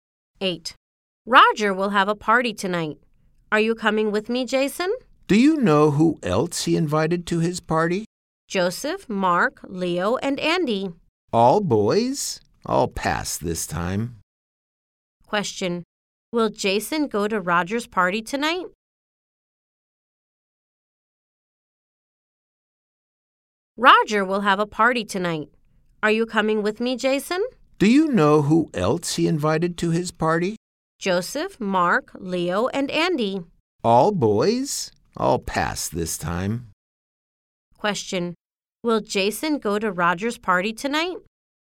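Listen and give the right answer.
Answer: No, he won't.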